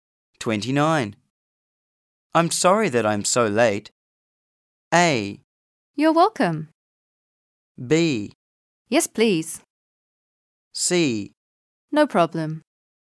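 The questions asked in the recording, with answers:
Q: I'm sorry that I'm so late.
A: C: No problem.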